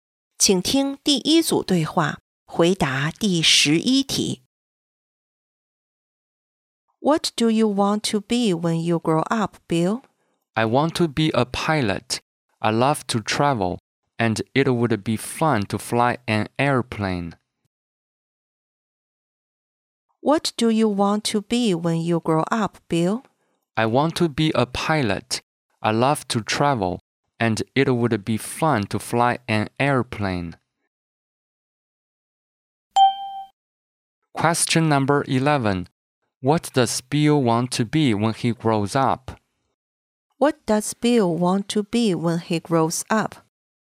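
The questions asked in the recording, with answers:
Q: What does Bill want to be when he grows up?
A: A pilot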